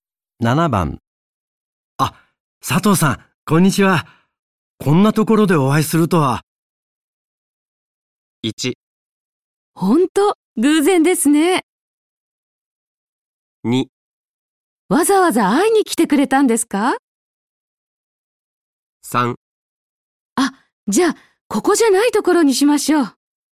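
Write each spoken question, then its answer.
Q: あ、佐藤さん、こんにちは。こんなところでお会いするとは。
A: 1: ほんと、偶然ですね。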